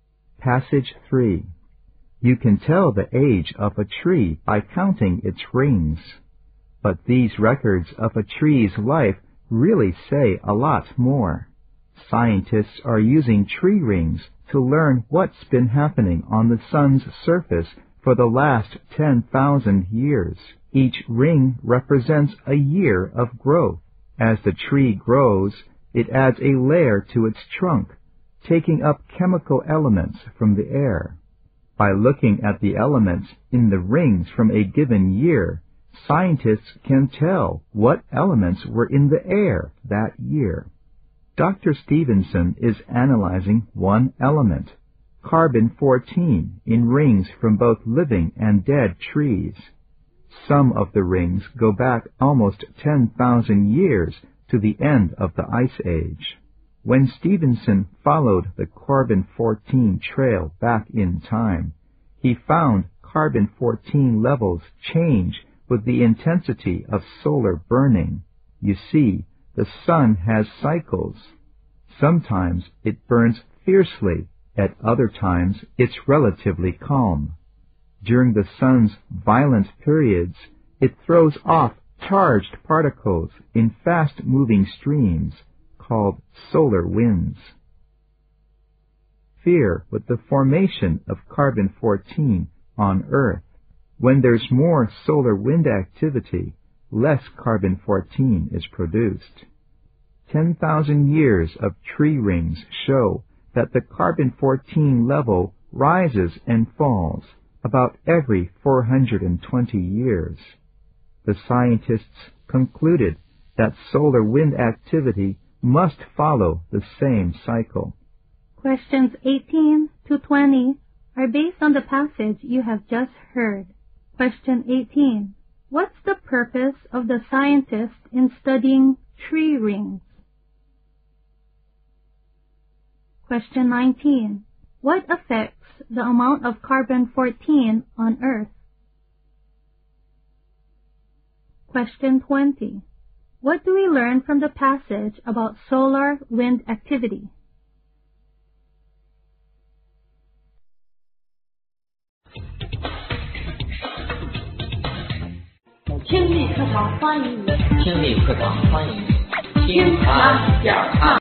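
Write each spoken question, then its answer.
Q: What's the purpose of the scientist in studying tree rings?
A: To learn about activity on the sun's surface

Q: What affects the amount of carbon-14 on Earth?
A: Solar wind activity

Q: What do we learn from the passage about solar wind activity?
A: It follows a cycle of about 420 years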